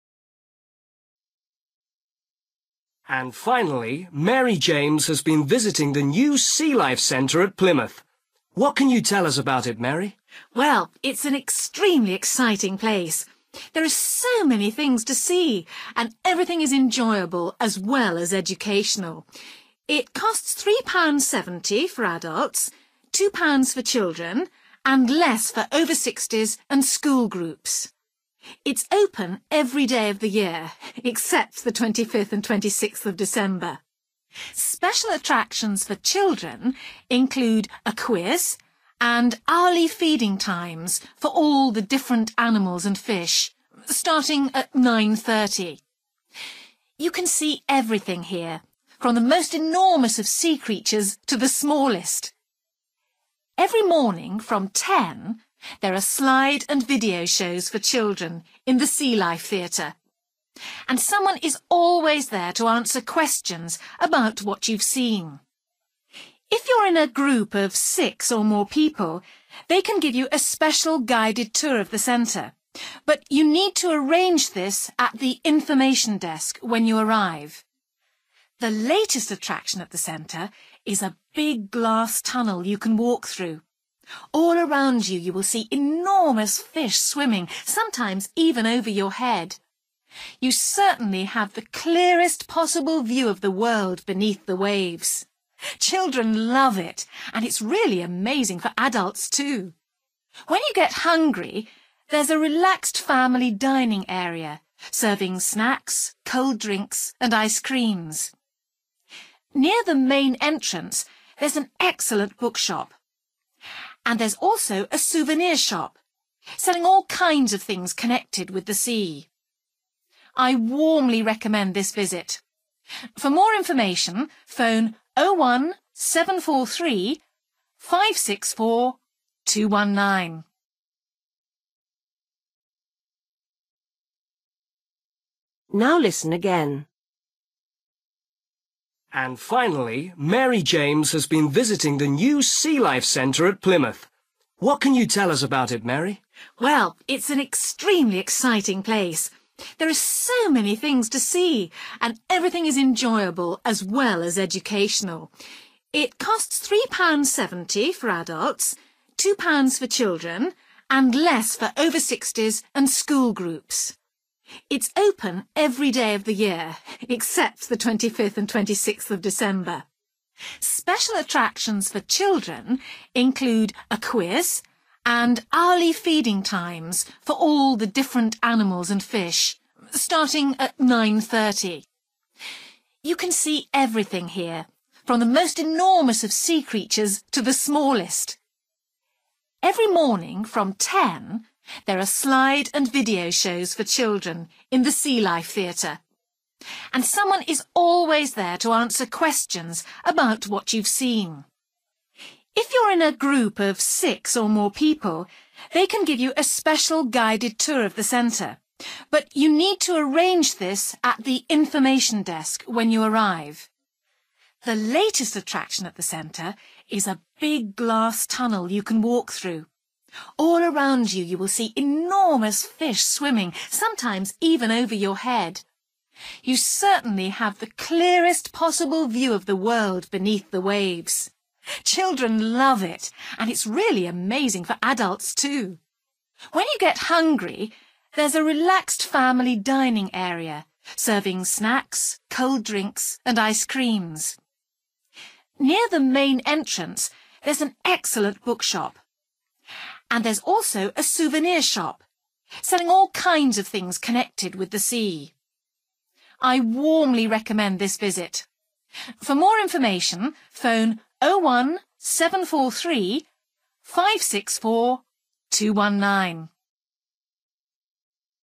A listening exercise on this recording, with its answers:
For each question, fill in the missing information in the numbered space.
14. Adults (14) £ ........................, children £20.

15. Animals are fed every (15) ........................ from 9.30 am.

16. Slide and (16) ........................ shows from 10.00 am.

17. Guided tours available – ask at the (17) ........................ .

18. Walk through the big (18) ........................ made of glass.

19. Family area sells (19) ........................, cold drinks, ice creams.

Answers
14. £3.70
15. hour/hourly
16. video(s)
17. information desk
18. tunnel
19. snack(s)

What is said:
and finally Mary James has been visiting the new Sea Life Centre at Plymouth. What can you tell us about it, Mary?
Woman: Well, it's an extremely exciting place. There are so many things to see and everything is enjoyable as well as educational. It costs £3.70 for adults, £2 for children and less for over sixties and school groups. It's open every day of the year except the 25th and 26th of December.
Special attractions for children include a quiz and hourly feeding times for all the different animals and fish, starting at 9.30. You can see everything here from the most enormous of sea creatures to the smallest.
Every morning from 10.00 there are slide and video shows for children in the sea life theatre, and someone is always there to answer questions about what you've seen. If you are in a group of six or more people, they can give you a special guided tour of the centre. But you need to arrange this at the information desk when you arrive.
The latest attraction at the centre is a big glass tunnel you can walk through; all around you, you will see enormous fish swimming – sometimes even over your head. You certainly have the clearest possible view of the world beneath the waves. Children love it and it's really amazing for adults too!
When you get hungry, there is a relaxed family dining area serving snacks, cold drinks and ice creams. Near the main entrance there is an excellent bookshop and there's also a souvenir shop selling all kinds of things connected with the sea.
I warmly recommend this visit; for more information phone 01743 564219.

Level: B1